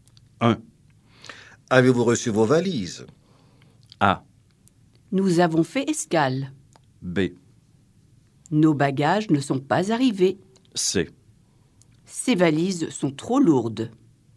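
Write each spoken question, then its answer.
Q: Avez-vous reçu vos valises?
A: B: Nos bagages ne sont pas arrivés.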